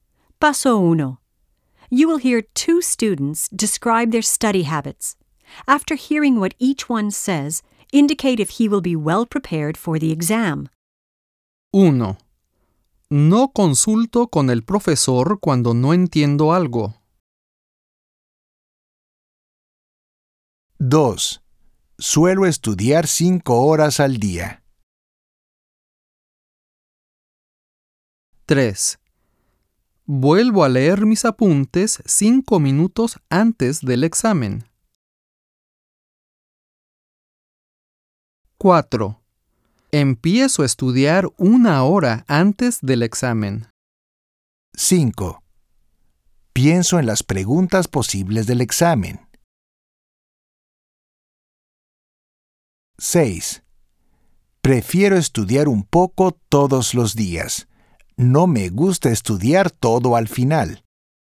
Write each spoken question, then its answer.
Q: No consulto con el profesor cuando no entiendo algo.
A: No muy bien preparado.

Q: Suelo estudiar 5 horas al día.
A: Bien preparado.

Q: Empiezo a estudiar 1 hora antes del examen.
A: No muy bien preparado.

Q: Pienso en las preguntas posibles del examen.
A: Bien preparado.

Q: Prefiero estudiar un poco todos los días.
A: Bien preparado.